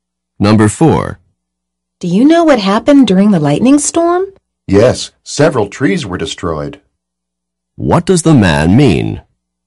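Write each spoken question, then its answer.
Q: What does the man mean?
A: Several trees were destroyed in the storm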